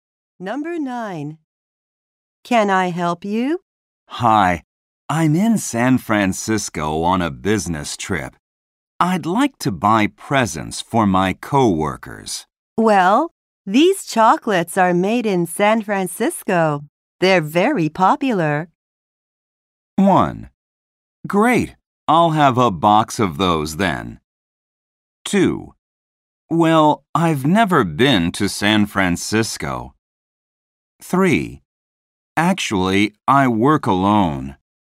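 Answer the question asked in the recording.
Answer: 1: Great, I'll have a box of those then.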